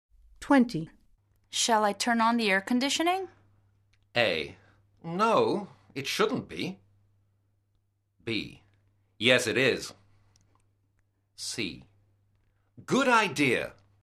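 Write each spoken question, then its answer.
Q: Shall I turn on the air conditioning?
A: C: Good idea.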